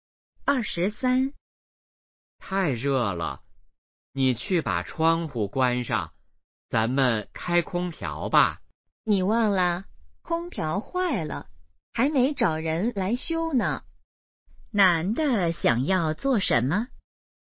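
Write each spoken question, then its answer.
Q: 男的想要做什么?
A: 开空调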